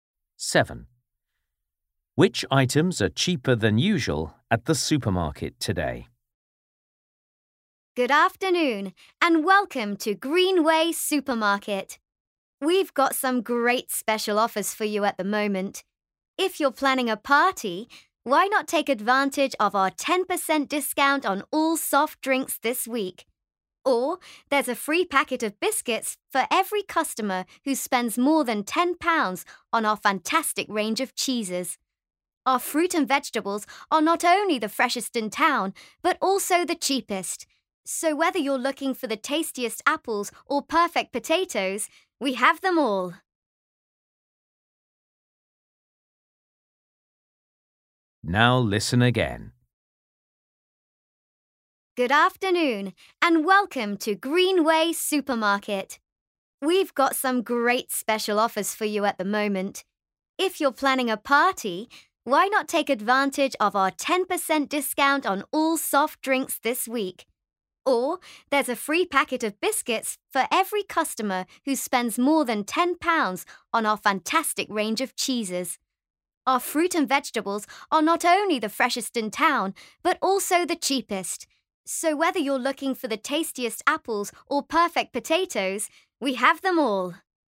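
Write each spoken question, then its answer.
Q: Which items are cheaper than usual at the supermarket today?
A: Soft drinks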